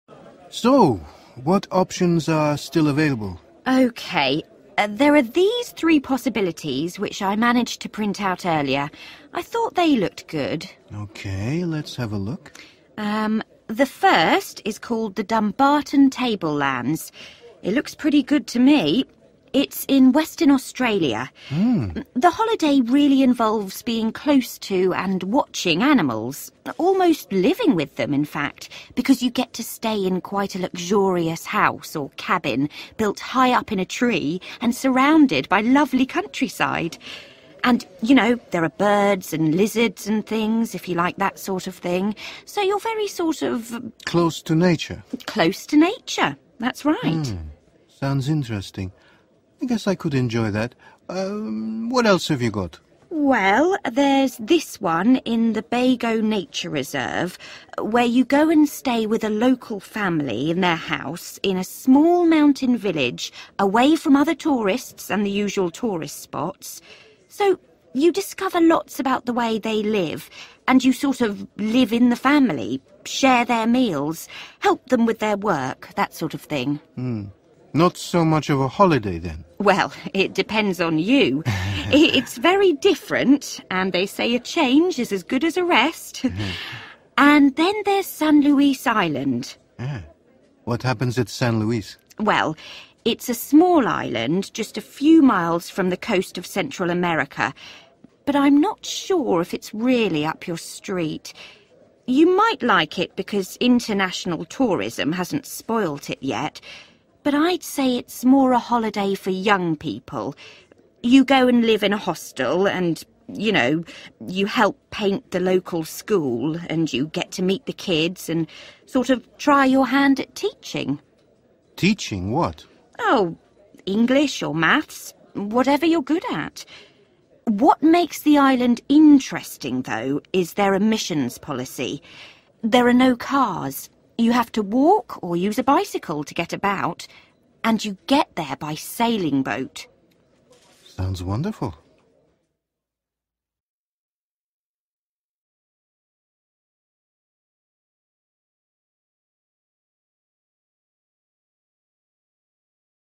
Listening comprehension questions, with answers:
Complete the table below. Choose ONE OR TWO WORDS for each answer.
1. House in a 1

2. live with a 2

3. working in a 3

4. Holiday location without 4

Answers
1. tree
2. (local) family
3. school
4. cars

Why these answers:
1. Từ cần điền là một danh từ vì trước đó là mạo từ "a". Trong bài, nhân viên du lịch nói Igor sẽ "ở trong một căn nhà/cabin được xây cao trên một cái cây". Cụm "built high up in a tree" cho biết chỗ ở nằm trên cây.
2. Từ cần điền là một danh từ vì trước đó là mạo từ "a". Bài nói rõ bạn sống cùng một gia đình địa phương.
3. Từ cần điền là một danh từ vì trước đó là mạo từ "a". Bài nói "help paint the local school" và còn "try your hand at teaching". Đây là hoạt động liên quan trực tiếp đến trường học.
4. Từ cần điền là danh từ. Nhân viên nói "There are no cars". Nghĩa là địa điểm nghỉ dưỡng không có xe hơi, phải đi bộ/xe đạp.

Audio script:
Igor: So, what options are still available?
Travel agent: Okay. There are these three possibilities which I managed to print out earlier. I thought they looked good.
I: OK, let's have a look.
T: The first is called the Dumbarton tablelands. It looks pretty good to me. It's in Western Australia. The holiday really involves being close to and watching animals – almost living with them, in fact, because you get to stay in quite a luxurious house or cabin built high up in a tree and surrounded by lovely countryside. And, you know, there are birds and lizards and things if you like that sort of thing, so you're very sort of...
I: Close to nature
T: Close to nature, that's right.
I: Sounds interesting. I guess I could enjoy that. What else have you got?
T: Well, there's this one in the Bago Nature Reserve, where you go and stay with a local family in their house in a small mountain village away from other tourists and the usual tourist spots, so you discover lots about the way they live and you sort of live in the family, share their meals, help them with their work, that sort of thing.
I: Hmm not so much of a holiday, then.
T: Well it depends on you. It's very different, and they say a change is as good as a rest. And then there's Sun Iluis Island.
I: What happens at San Luis?
T: Well, it's a small island, just a few miles from the coast of Central America, but I'm not sure if it's really up your street. You might like it because international tourism hasn't spoiled it yet, but I'd say it's more a holiday for young people. You go and live in a hostel and, you know, you help paint the local school and you get to meet the kids and sort of try your hand at teaching.
I: Teaching what?
Bài nói "help paint the local school" và còn "try your hand at teaching".
T: Oh, English or maths, whatever you're good at. What makes the island interesting, though, is their emissions policy. There are no cars – you have to walk or use a bicycle to get about, and you get there by sailing boat.